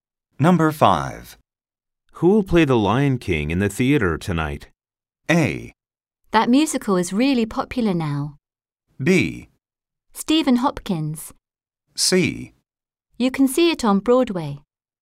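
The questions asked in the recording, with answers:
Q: Who will play The Lion King in the theater tonight?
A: B: Stephen Hopkins.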